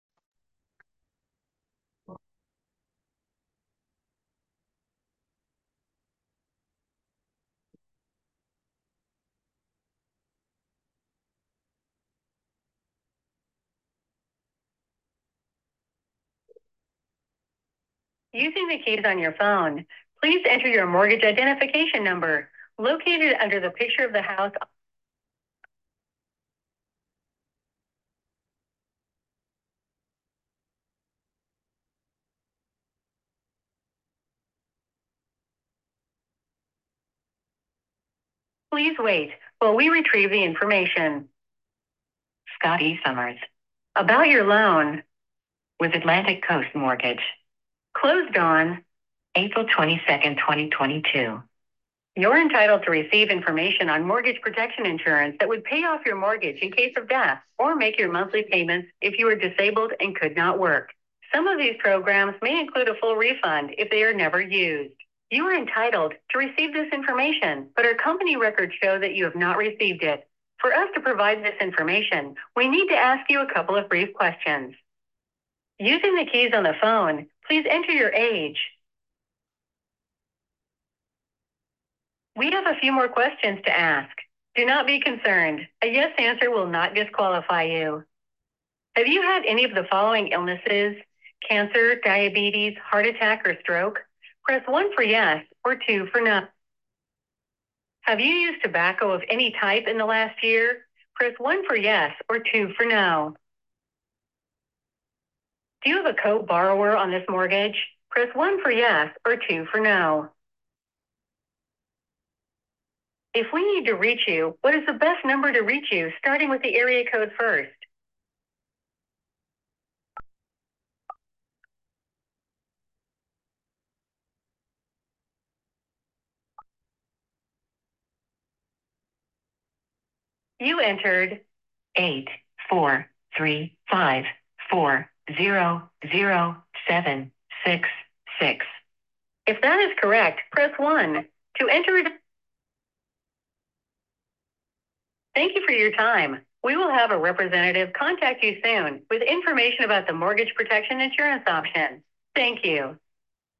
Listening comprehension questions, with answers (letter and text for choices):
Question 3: For a Call-In Lead, The Prospect Provides Information On Smoking And Co-Borrower Status _________?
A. By Using The Phone Keypad Prompts To Answer Questions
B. Calling The Agent Directly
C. On A Recorded Call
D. None Of The Above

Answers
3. A. By Using The Phone Keypad Prompts To Answer Questions

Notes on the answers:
Review The Mechanics Video